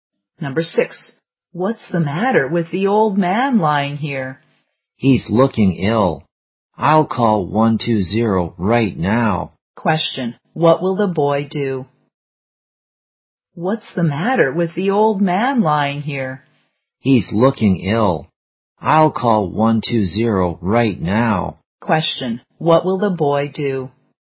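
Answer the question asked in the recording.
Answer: Call 120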